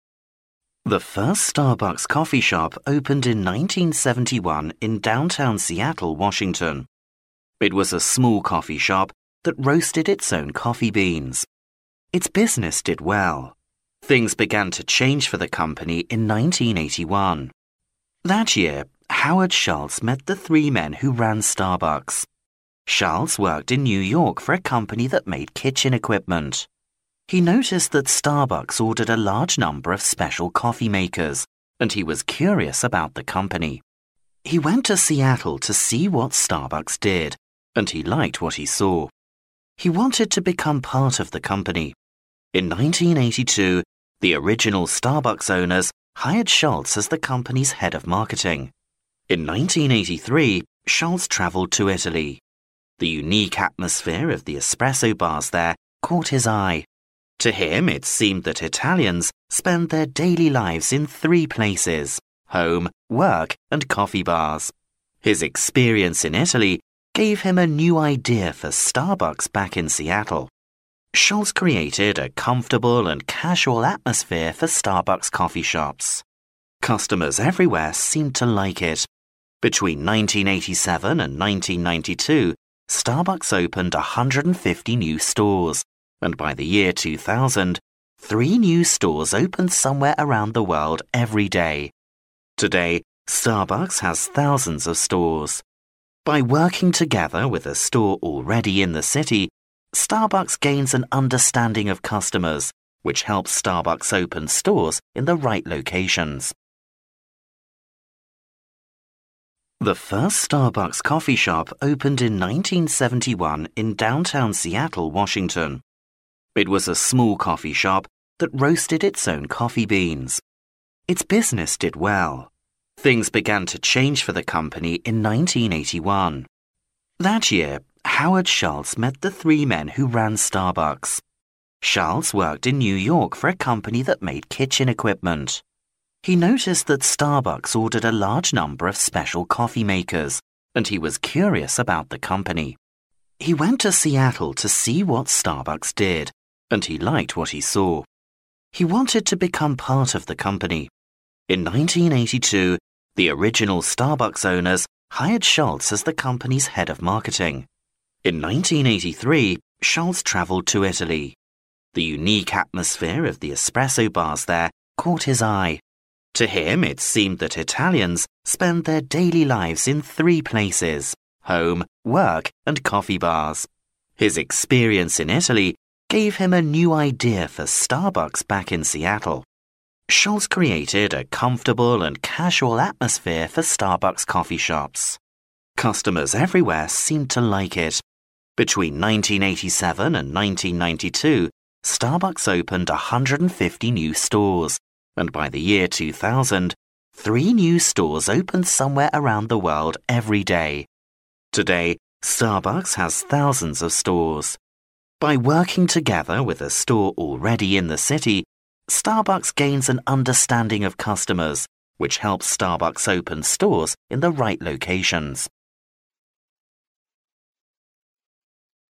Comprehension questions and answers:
Listen to the passage. For questions 26—30, complete the notes using no more than three words for each blank.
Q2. A man in New York noticed the small company bought a lot of special 2 to make coffee.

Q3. He went to Seattle to learn about the company and later 3 by Starbucks.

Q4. This man changed the 4 of the stores and helped make Starbucks a huge company.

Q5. Today Starbucks has 5 stores all over the world.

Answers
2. coffee makers
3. was hired
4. atmosphere
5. thousands of

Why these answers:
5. 根据录音中的"Today, Starbucks has thousands of stores. "可知如今,星巴克在全球有数千家分店。因此填thousands of。

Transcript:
[听力原文] The first Starbucks coffee shop opened in 1971 in downtown Seattle, Washington. It was a small coffee shop that roasted its own coffee beans. Its business did well. Things began to change for the company in 1981. That year, Howard Schultz met the three men who ran Starbucks. Schultz worked in New York for a company that made kitchen equipment. He noticed that Starbucks ordered a large number of special coffee makers, and he was curious about the company. He went to Seattle to see what Starbucks did, and he liked what he saw. He wanted to become part of the company. In 1982, the original Starbucks owners hired Schultz as the company's head of marketing. In 1983, Schultz travelled to Italy. The unique atmosphere of the espresso bars there caught his eye. To him it seemed that Italians spent their daily lives in three places: home, work and coffee bars. His experience in Italy gave him a new idea for Starbucks back in Seattle. Schultz created a comfortable and casual atmosphere for Starbucks coffee shops. Customers everywhere seemed to like it. Between 1987 and 1992, Starbucks opened 150 new stores, and by the year 2000, three new stores opened somewhere around the world every day. Today, Starbucks has thousands of stores. By working together with a store already in the city, Starbucks gains an understanding of customers, which helps Starbucks open stores in the right locations.